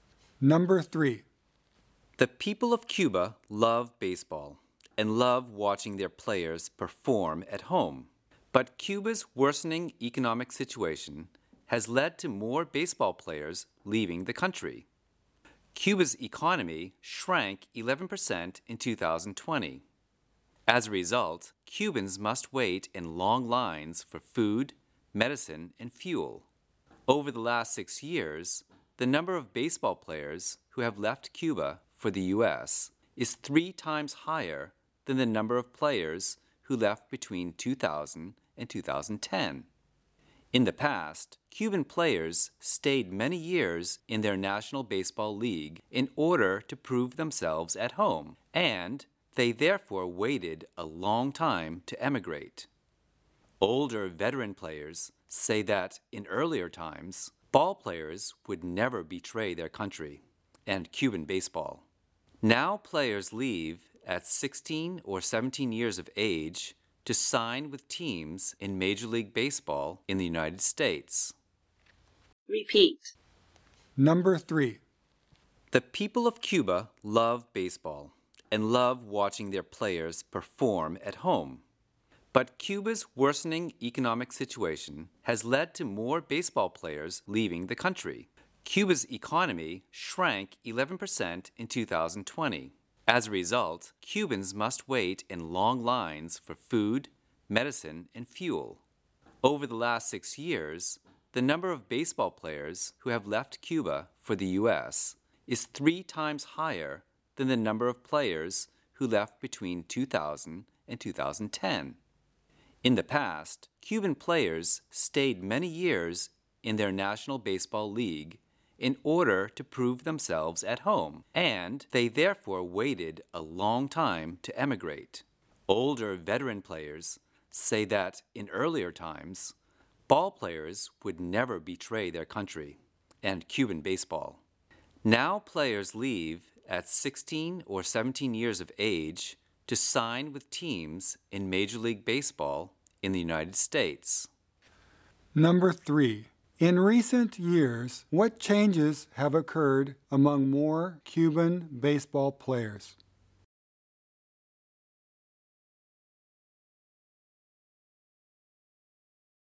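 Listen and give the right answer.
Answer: More of them leave Cuba for the U.S. at a young age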